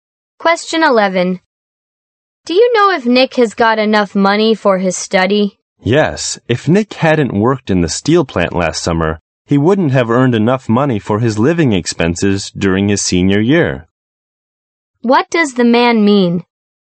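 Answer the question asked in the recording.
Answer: Nick earned enough money by working in the steel plant last summer.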